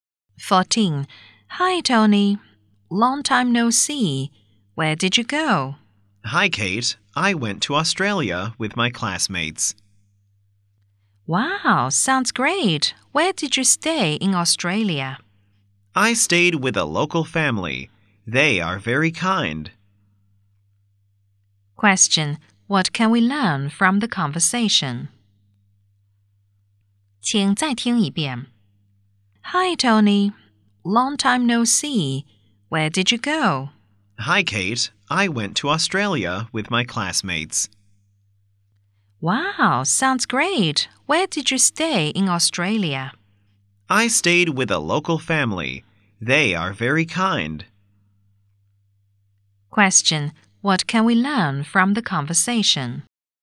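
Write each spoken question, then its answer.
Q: Question: What can we learn from the conversation?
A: Tony went to Australia with his classmates and stayed with a local family.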